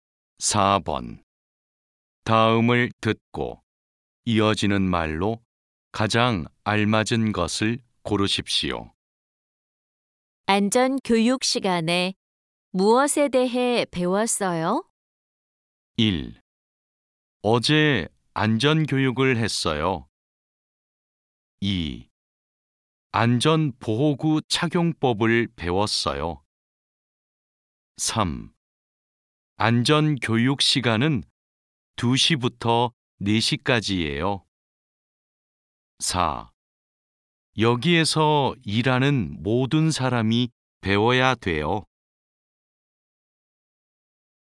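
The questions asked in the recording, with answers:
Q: 안전 교육 시간에 무엇에 대해 배웠어요?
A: 2: 안전 보호구 착용법을 배웠어요.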